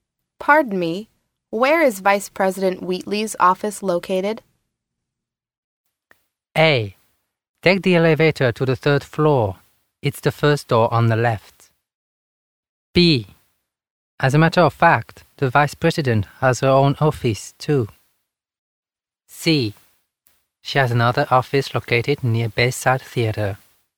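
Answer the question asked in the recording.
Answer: A: Take the elevator to the third floor. It's the first door on the left.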